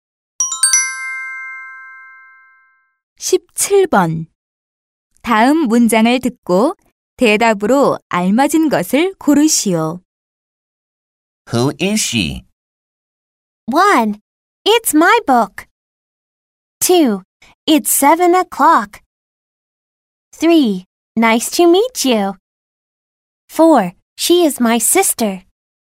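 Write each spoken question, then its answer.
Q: 다음 문장을 듣고 대답으로 알맞은 것을 고르시오.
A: 4: She is my sister.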